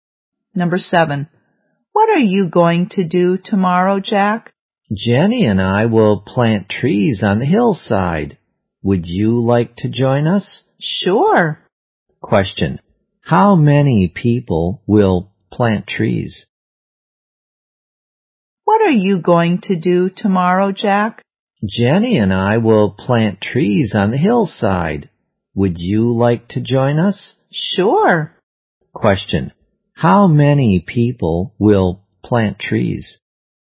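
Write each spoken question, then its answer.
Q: How many people will plant trees?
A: Three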